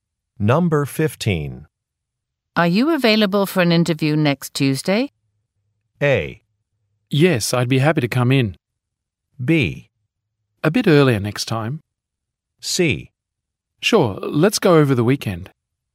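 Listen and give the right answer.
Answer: A: Yes, I'd be happy to come in.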